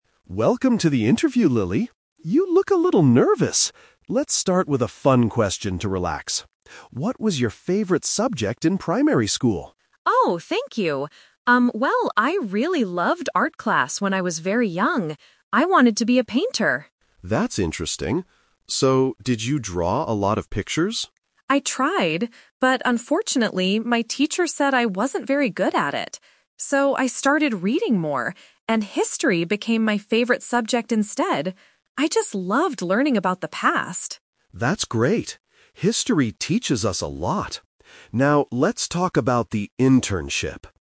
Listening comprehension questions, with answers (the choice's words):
Listen to an interviewer and a candidate talking before a job interview. Then, read the questions below and choose the correct answer (A, B, or C) for each question.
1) What did Lily want to be when she was very young?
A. A history teacher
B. A painter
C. An office worker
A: A painter

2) Why did Lily change her mind about art?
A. Her teacher said she wasn't very good at it.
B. She thought drawing pictures was too boring.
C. She didn't like her art teacher anymore.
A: Her teacher said she wasn't very good at it.

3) What was Lily's favorite subject in the end?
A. Art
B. Science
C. History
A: History

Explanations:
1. Lily says, "I really loved art class... I wanted to be a painter!" Option (A) is a trap; she liked history later, but she never said she wanted to be a history teacher. Option (C) is a plausible job, but it is not mentioned in the audio.
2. Lily explains her twist by saying, "But unfortunately, my teacher said I wasn't very good at it." Option (B) is a trap; she actually "loved art class," so she didn't think it was boring. Option (C) is a trap; she mentions her teacher, but she doesn't say she disliked the teacher.
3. Lily says, "So, I started reading more, and history became my favorite subject instead." Option (A) is a trap; art was her favorite at first, but it changed because of what her teacher said. Option (B) is a common school subject but is never mentioned in the conversation.

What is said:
Davis: Welcome to the interview, Lily. You look a little nervous! Let's start with a fun question to relax. What was your favorite subject in primary school?
Lily: Oh, thank you. Um, well, I really loved art class when I was very young. I wanted to be a painter!
Mr. Davis: That's interesting. So, did you draw a lot of pictures?
Lily: I tried! But unfortunately, my teacher said I wasn't very good at it. So, I started reading more, and history became my favorite subject instead. I just loved learning about the past.
Davis: That's great. History teaches us a lot. Now, let's talk about the internship...